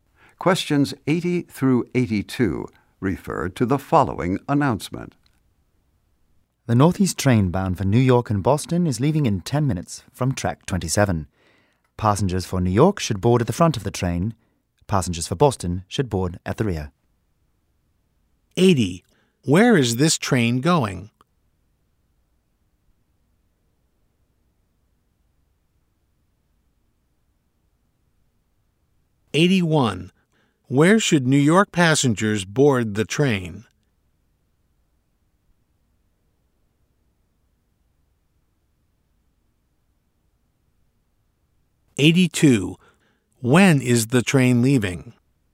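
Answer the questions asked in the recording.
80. New York and Boston
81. At the front of the train
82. In 10 minutes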